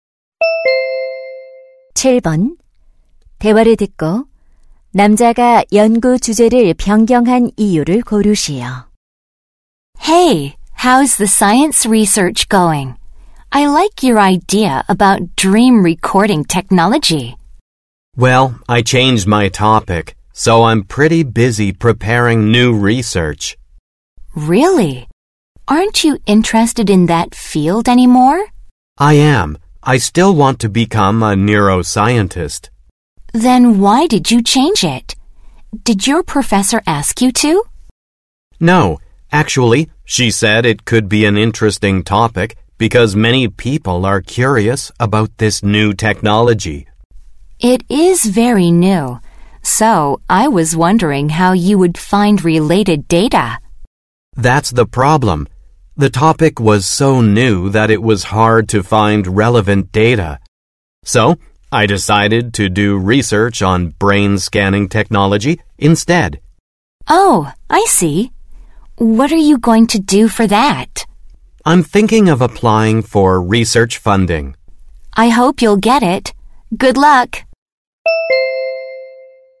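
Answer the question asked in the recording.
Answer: 관련 자료를 찾기 어려워서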